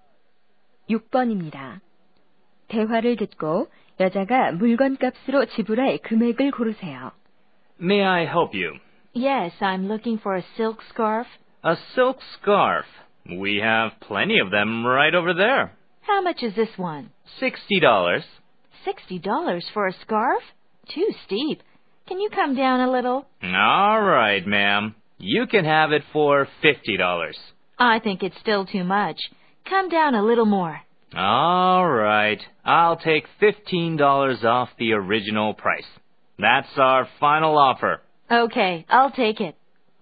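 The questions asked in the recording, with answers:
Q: 대화를 듣고 여자가 물건값으로 지불할 금액을 고르세요.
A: 45달러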